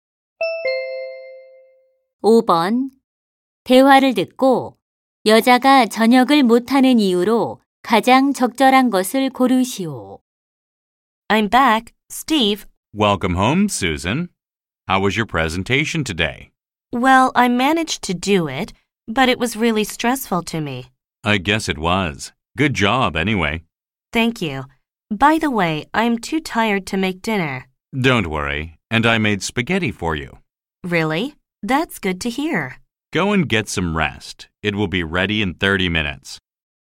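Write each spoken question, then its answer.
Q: 대화를 듣고 여자가 저녁을 못하는 이유로 가장 적절한 것을 고르시오.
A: 발표 때문에 너무 피곤해서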